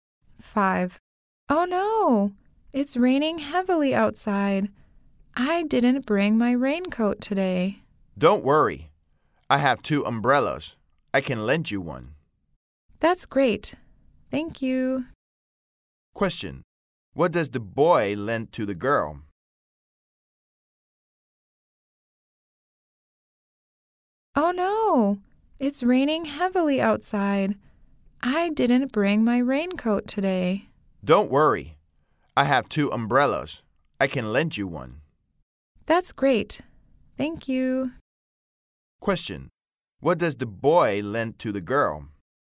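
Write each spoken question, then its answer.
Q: What does the boy lend to the girl?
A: An umbrella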